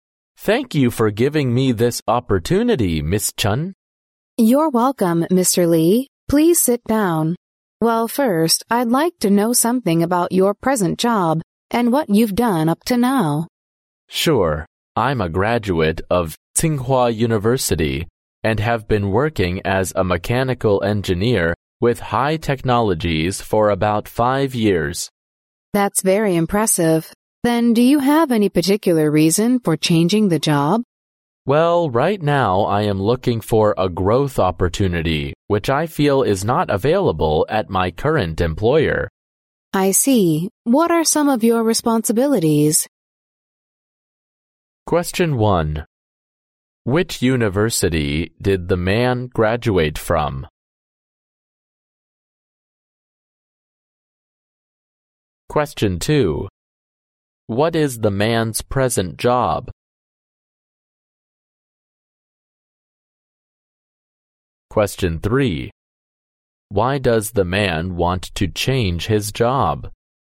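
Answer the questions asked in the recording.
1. Tsinghua University
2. A mechanical engineer
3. He is looking for a growth opportunity not available at his current employer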